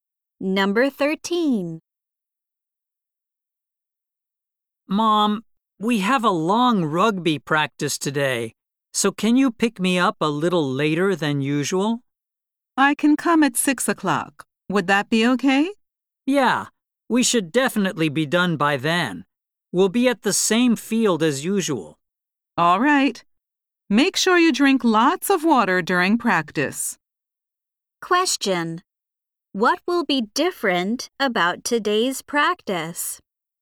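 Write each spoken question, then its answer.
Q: What will be different about today's practice?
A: It will be longer than usual.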